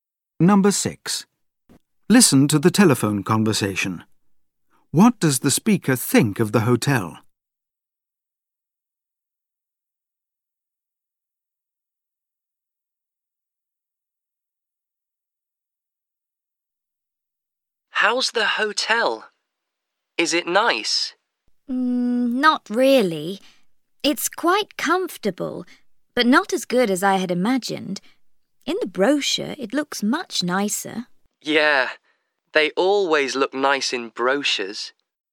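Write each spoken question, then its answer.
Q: What does the speaker think of the hotel?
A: It's comfortable but not as good as expected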